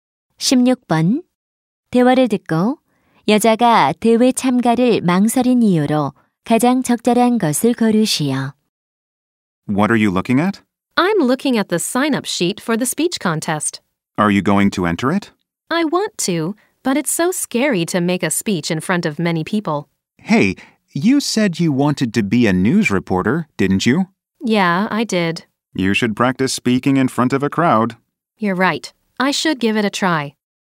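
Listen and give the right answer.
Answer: 많은 사람 앞에서 말하는 것이 무서워서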